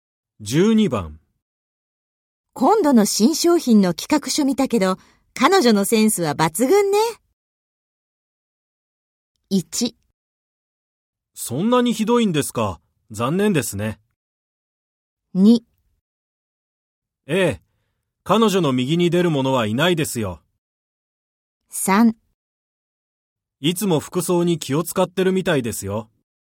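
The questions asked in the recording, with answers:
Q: 今度の新商品の企画書見たけど、彼女のセンスは抜群ね。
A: 2: ええ、彼女の右に出る者はいないですよ。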